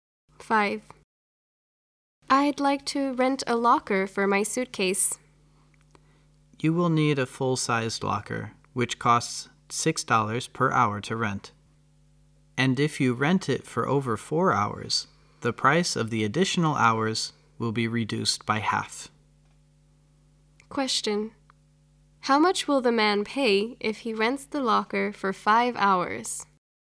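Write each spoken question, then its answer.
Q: How much will the man pay if he rents the locker for 5 hours?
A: $27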